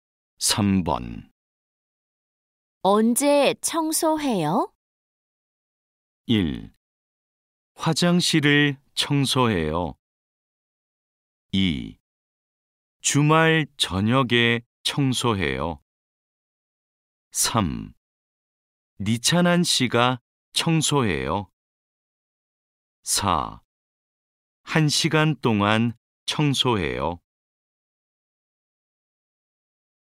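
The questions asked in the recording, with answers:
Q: 언제 청소해요?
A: 2: 주말 저녁에 청소해요.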